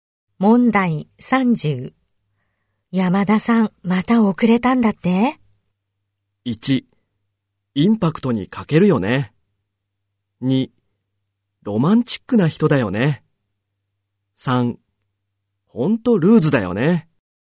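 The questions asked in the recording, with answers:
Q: 山田さん、また遅れたんだって?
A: 3: ほんとルーズだよね。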